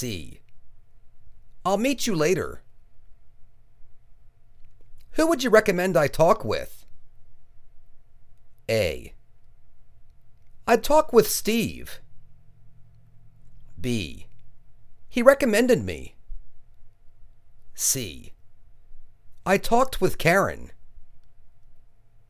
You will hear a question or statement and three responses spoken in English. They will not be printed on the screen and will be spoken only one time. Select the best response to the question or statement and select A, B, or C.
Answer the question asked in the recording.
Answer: I'd talk with Steve.